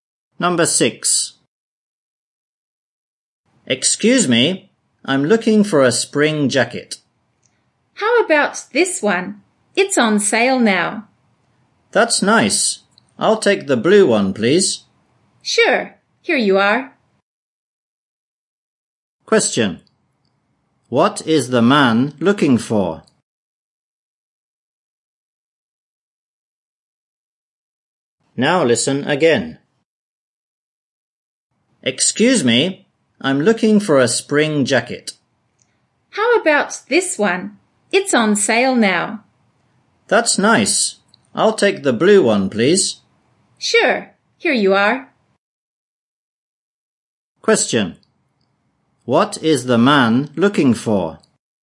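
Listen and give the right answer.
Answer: A spring jacket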